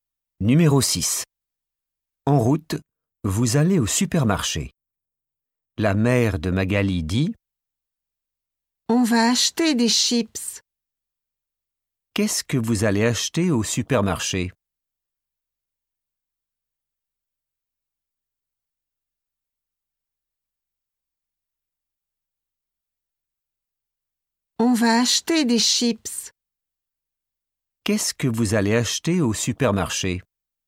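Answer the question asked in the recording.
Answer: des chips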